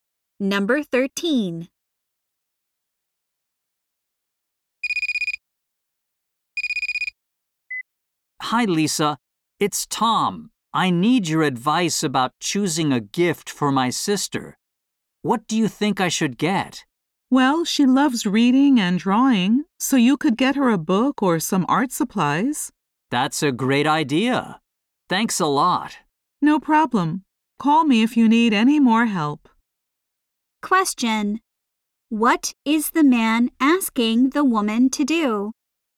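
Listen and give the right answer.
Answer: Give advice on a gift for his sister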